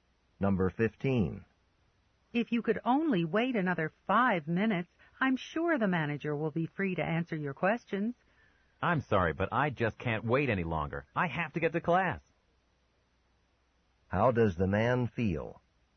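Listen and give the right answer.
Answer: He can't wait any longer because he has to go to class.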